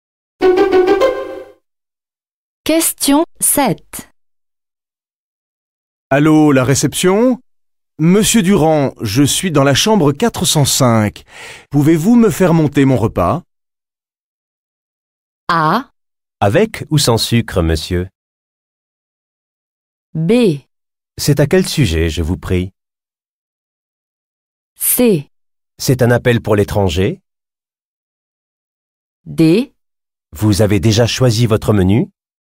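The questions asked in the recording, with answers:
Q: Pouvez-vous me faire monter mon repas?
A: D: Vous avez déjà choisi votre menu?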